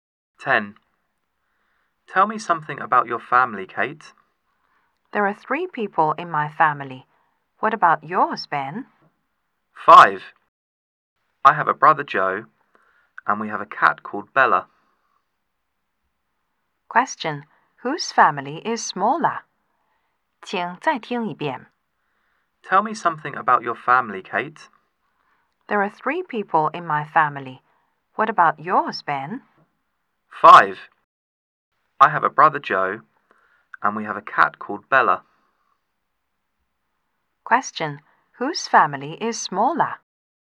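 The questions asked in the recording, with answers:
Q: Whose family is smaller?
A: Kate's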